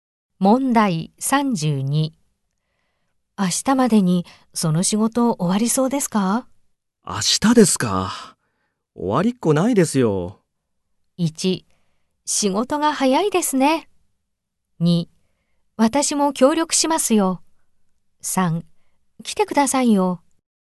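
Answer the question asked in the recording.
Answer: 2: 私も協力しますよ。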